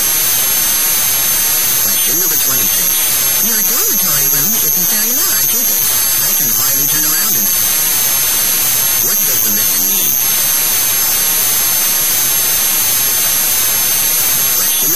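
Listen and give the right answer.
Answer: A larger room.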